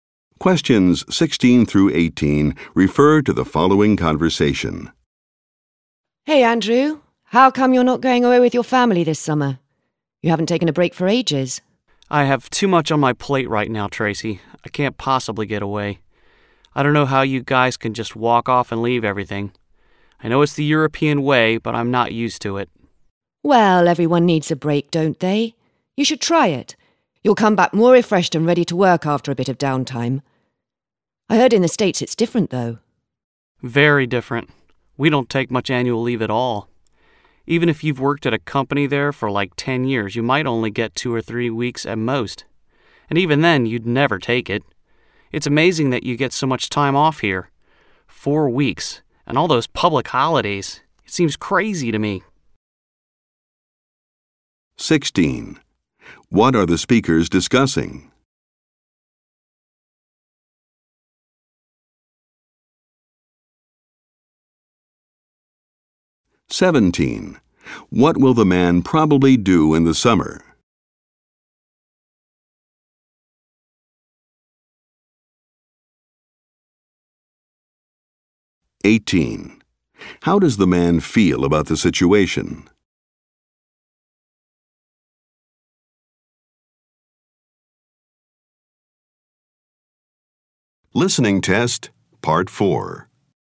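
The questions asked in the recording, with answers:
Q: What are the speakers discussing?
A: Vacations and annual leave

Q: What will the man probably do in the summer?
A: Stay and keep working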